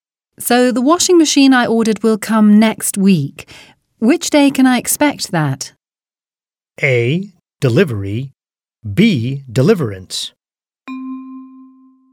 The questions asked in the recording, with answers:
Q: Which day can I expect that?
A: A is correct. Delivery.